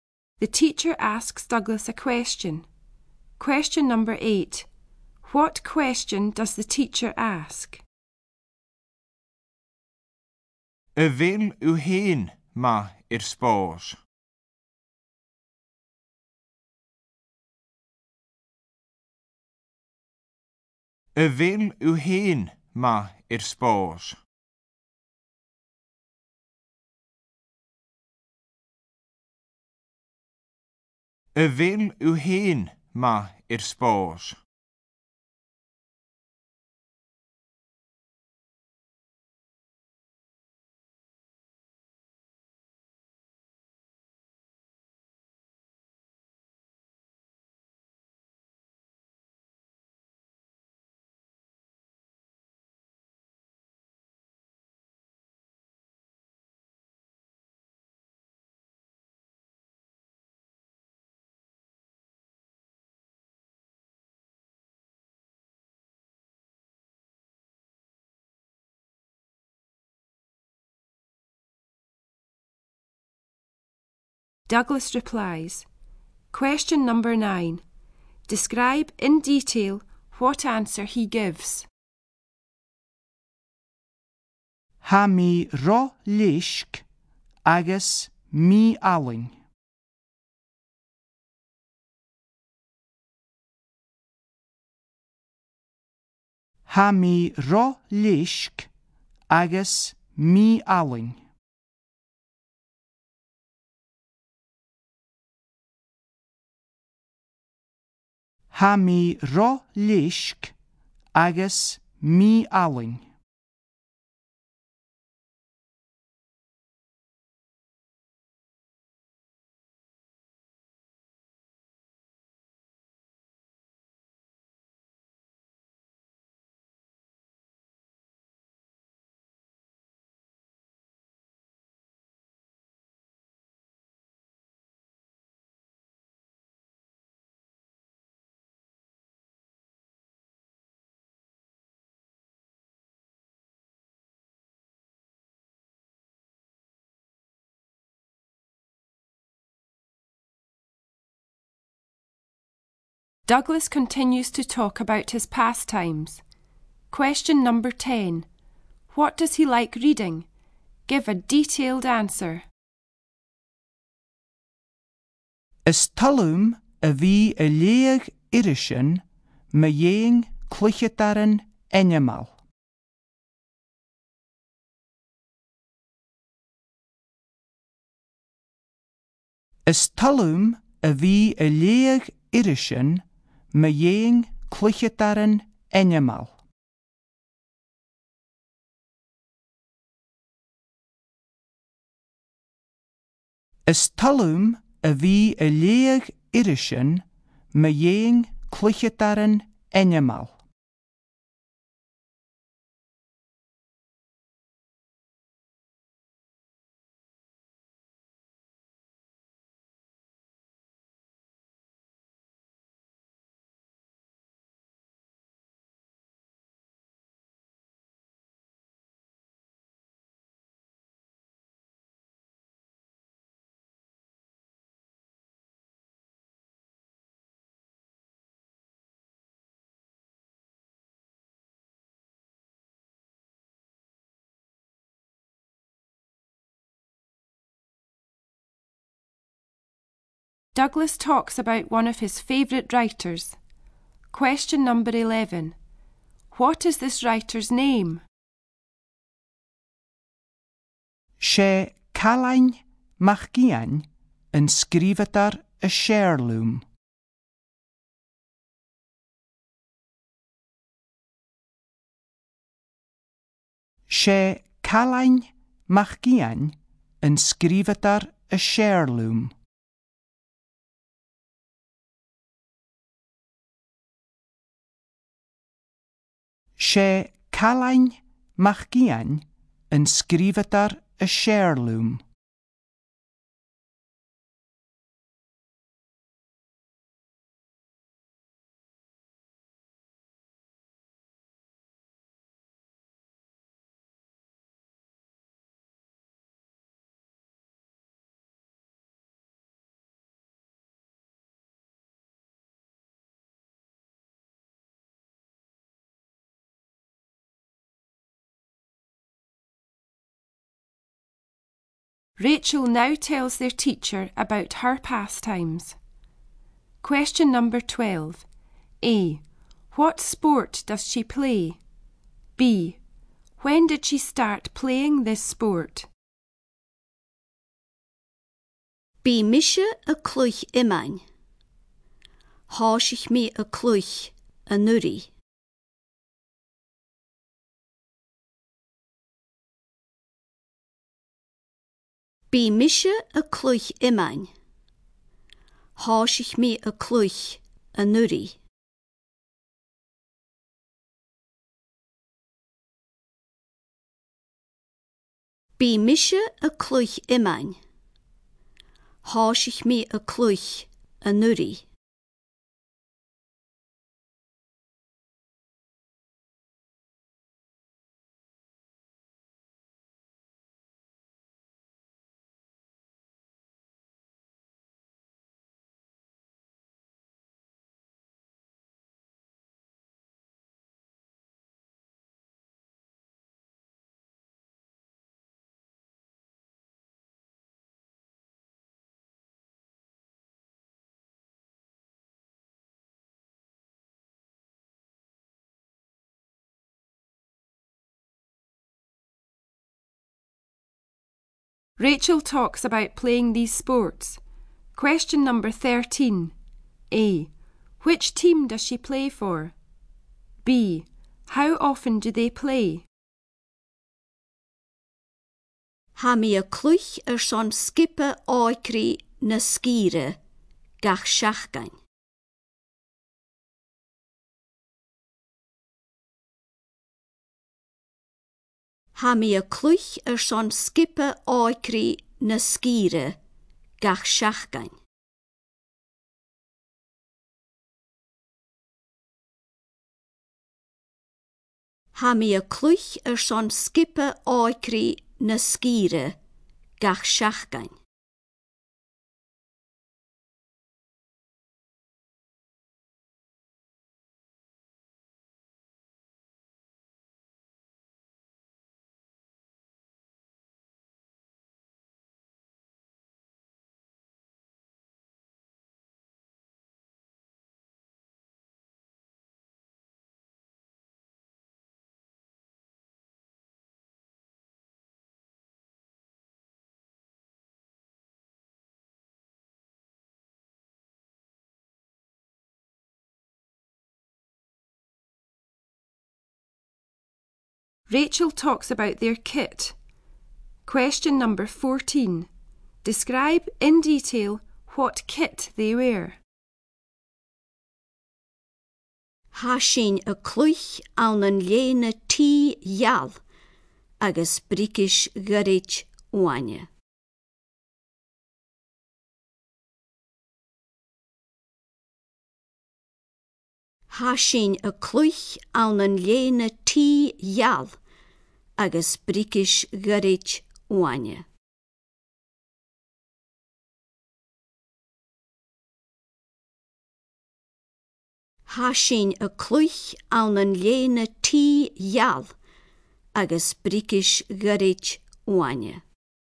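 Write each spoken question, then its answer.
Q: A. What sport does she play?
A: Shinty

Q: B. When did she start playing this sport?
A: Last year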